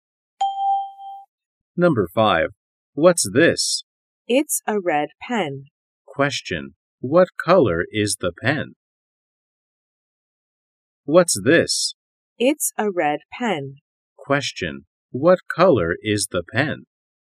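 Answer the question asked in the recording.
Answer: Red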